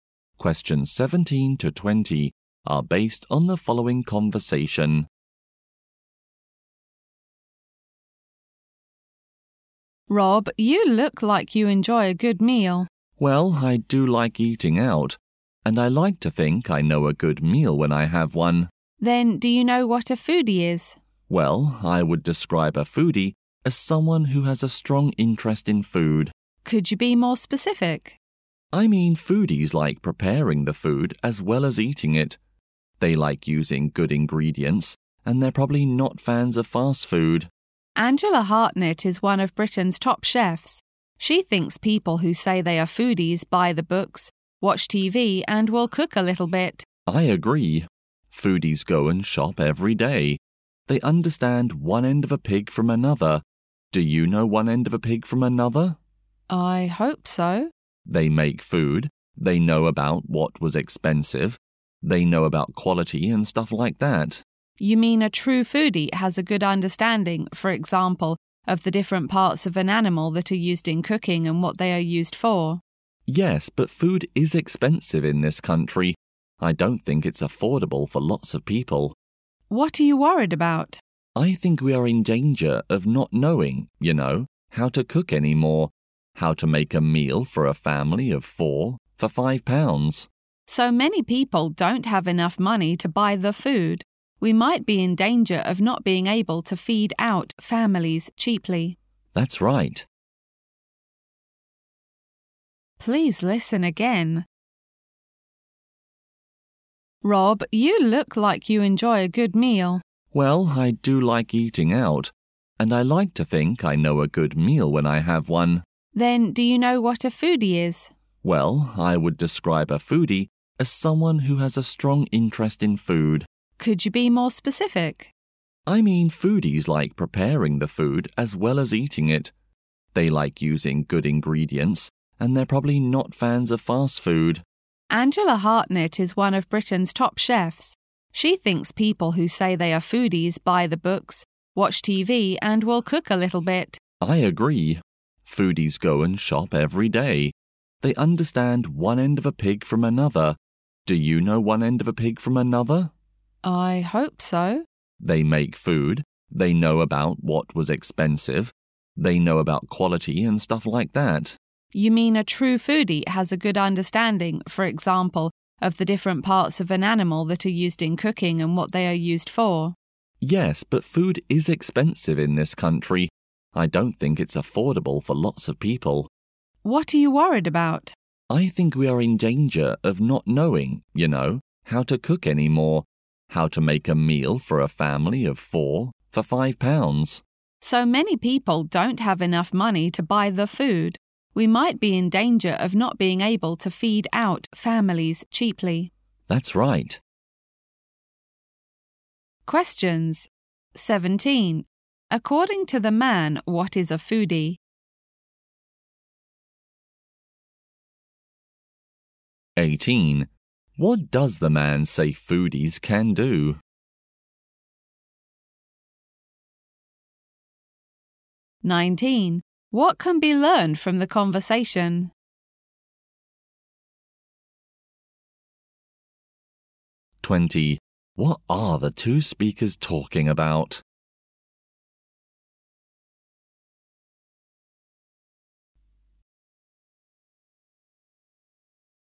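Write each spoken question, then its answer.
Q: According to the man, what is a foodie?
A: Someone with a strong interest in food

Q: What are the two speakers talking about?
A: Foodies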